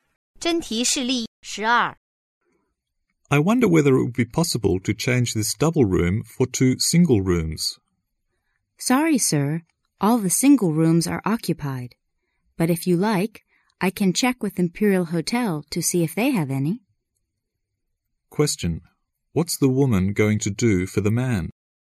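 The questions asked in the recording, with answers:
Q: What's the woman going to do for the man?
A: Ask the Imperial Hotel whether it has single rooms.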